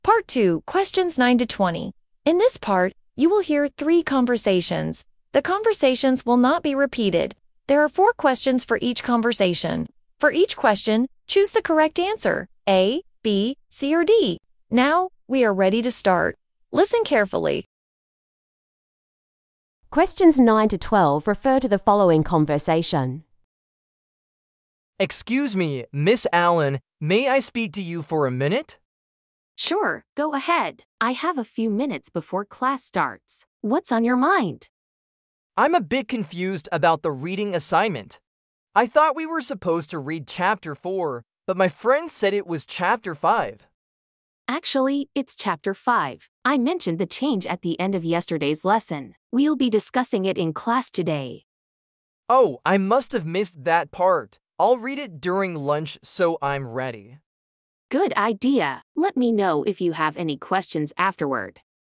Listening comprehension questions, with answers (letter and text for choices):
Conversation 1. Listen to a conversation between a professor and a student.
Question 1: Why is the boy confused?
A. He forgot to bring his book.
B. He didn't understand chapter 4.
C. He got the wrong homework information.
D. He was absent last week.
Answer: C. He got the wrong homework information.

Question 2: What does the teacher say about the reading?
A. It was canceled.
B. It changed to a different chapter.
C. It must be done next week.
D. It won't be discussed in class.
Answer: B. It changed to a different chapter.

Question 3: What will the boy probably do next?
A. Read during lunch.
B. Leave the school early.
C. Ask his friend for notes.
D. Call his parents.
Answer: A. Read during lunch.

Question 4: What is this conversation about?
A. A student asking for help with an essay.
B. A change in the reading assignment.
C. A student requesting to leave class early.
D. A discussion about grades.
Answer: B. A change in the reading assignment.

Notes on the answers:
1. I thought we were supposed to read chapter 4, but my friend said it was chapter 5. (Em tưởng chúng ta phải đọc chương 4, nhưng bạn em nói đó là chương 5.)
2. Actually, it's chapter 5. I mentioned the change at the end of yesterday's lesson. (Thực ra, đó là chương 5. Cô đã đề cập đến sự thay đổi này ở cuối bài học hôm qua.)
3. I'll read it during lunch so I'm ready. (Em sẽ đọc nó trong giờ ăn trưa để chuẩn bị sẵn sàng.)